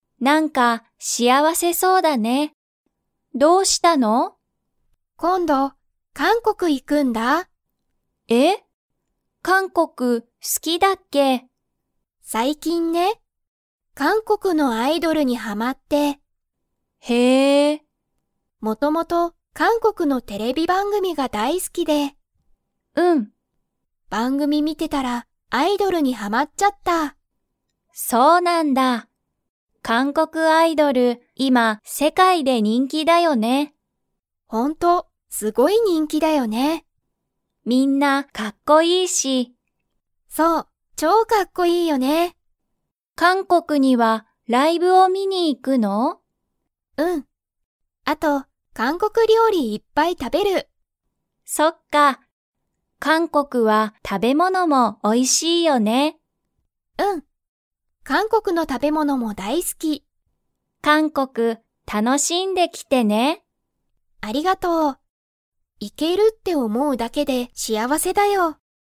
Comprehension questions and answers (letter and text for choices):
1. ユリは、何なににはまりましたか?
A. お酒さけ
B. アイドル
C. 音楽おんがく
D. 旅行りょこう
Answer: B. アイドル

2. ユリは、韓国かんこくにライブを 。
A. 観みに行いく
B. 観みに行いかない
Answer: A. 観みに行いく

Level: Level 4